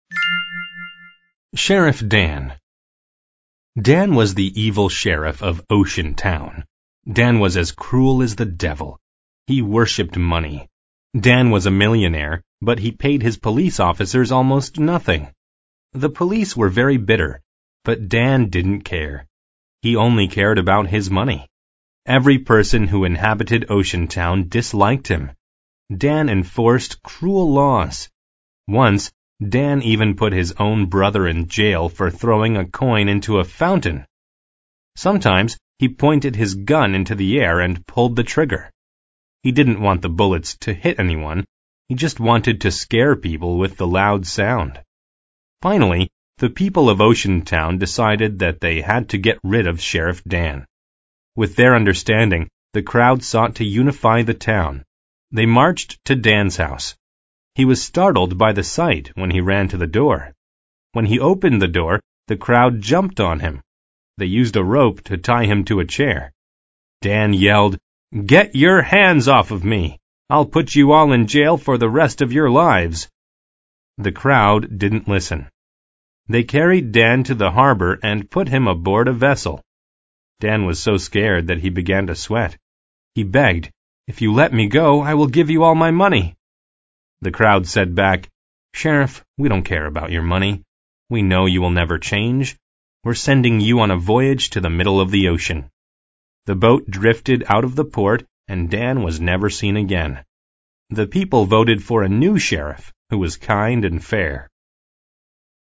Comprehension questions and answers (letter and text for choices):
Part B: Answer the questions.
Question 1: Where did the crowd take Dan?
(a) To the streets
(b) To the harbor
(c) To Dan's house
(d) To the jail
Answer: (b) To the harbor

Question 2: At the end of the reading, Dan _______.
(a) became fair and kind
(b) drifted into another port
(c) was never seen again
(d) made Oceantown happy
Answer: (c) was never seen again

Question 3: Why did Dan put his brother in jail?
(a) He broke a fair law.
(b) He tied Dan to a chair.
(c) He startled Dan.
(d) He tossed a coin in a fountain.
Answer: (d) He tossed a coin in a fountain.

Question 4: According to the reading, why did the crowd send Dan away?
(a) The police were bitter towards Dan.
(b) They wanted Dan's money.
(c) Dan was a devil to them.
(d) They hated millionaires.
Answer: (c) Dan was a devil to them.

Part A: Mark each statement T for true or F for false. Rewrite the false statements to make them true.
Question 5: The sheriff enforced cruel laws.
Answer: T

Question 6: Dan pulled the trigger on his gun and shot bullets in the air to scare away criminals.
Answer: F

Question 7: With their understanding, the crowd sought to unify the town.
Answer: T

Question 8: Dan's police officers were paid almost nothing.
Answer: T

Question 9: Dan was sent on a voyage around the world.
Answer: F

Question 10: Every person who inhabited Oceantown worshipped Dan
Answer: F

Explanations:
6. Dan pulled the trigger on his gun and shot bullets in the air to scare people in the town.
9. Dan was sent on a voyage to the middle of the ocean.
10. Every person who inhabited Ocean-town disliked Dan.

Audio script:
SHERIFF DAN
Dan was the evil sheriff of Oceantown. Dan was as cruel as the devil. He worshipped money. Dan was a millionaire, but he paid his police officers almost nothing. The police were very bitter, but Dan didn't care. He only cared about his money.
Every person who inhabited Oceantown disliked him. Dan enforced cruel laws. Once, Dan even put his own brother in jail for throwing a coin into a fountain! Sometimes he pointed his gun into the air and pulled the trigger. He didn't want the bullets to hit anyone. He just wanted to scare people with the loud sound.
Finally, the people of Oceantown decided that they had to get rid of Sheriff Dan. They marched to Dan's house. He was startled by the sight when he ran to the door. When he opened the door, the crowd jumped on him. They used a rope to tie him to a chair. Dan yelled, " Get your hands off of me! I'll put you all in jail for the rest of your lives!"
The crowd didn't listen. They carried Dan to the harbor and put him aboard a vessel. Dan was so scared that he began to sweat. He begged, " If you let me go, I will give you all my money!"
The crowd said back, " Sheriff, we don't care about your money. We know you will never change. We're sending you on a voyage to the middle of the ocean." The boat drifted out of the port, and Dan was never seen again. The people voted for a new sheriff who was kind and fair.